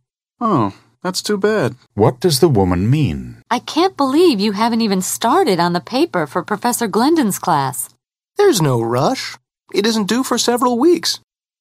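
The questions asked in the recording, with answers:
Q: What does the man say about the paper?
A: It isn't due for several weeks, so there's no hurry.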